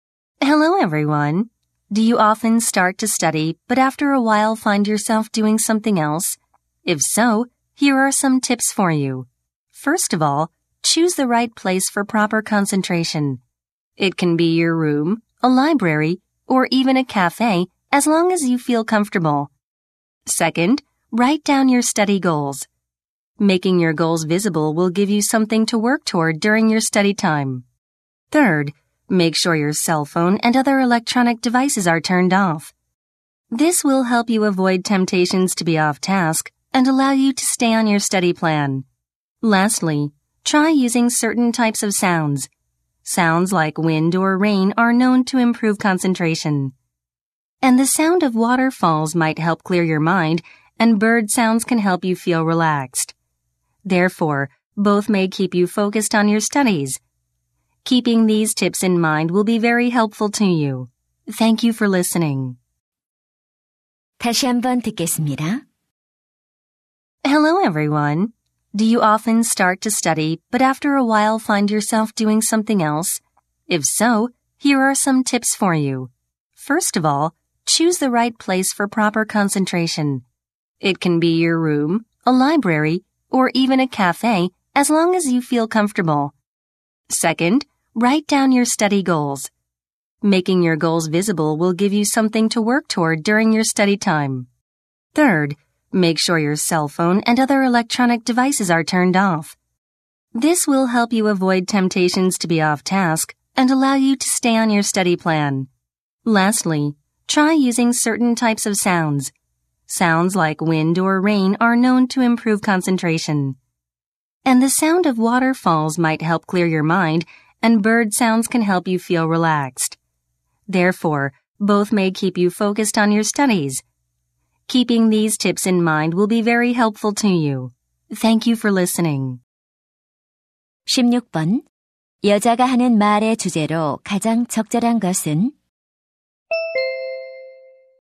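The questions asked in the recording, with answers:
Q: 여자가 하는 말의 주제로 가장 적절한 것은?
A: 공부에 집중하는 데 도움이 되는 방법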